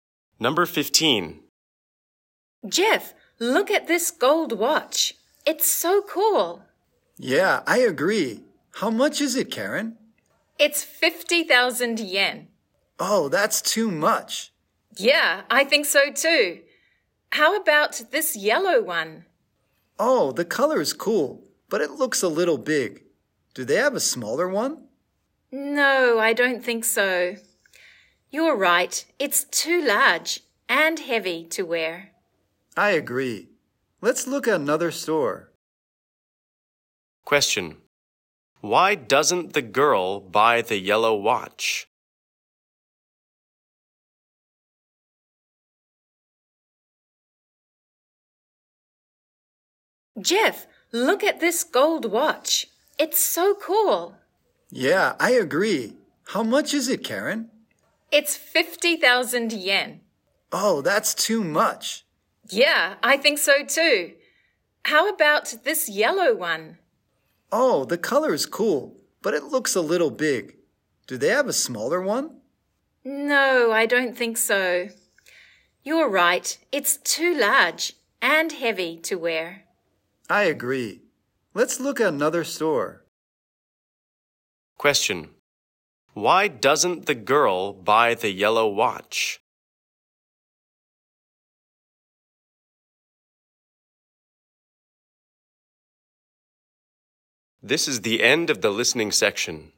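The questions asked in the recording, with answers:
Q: Why doesn't the girl buy the yellow watch?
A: It's too large and heavy to wear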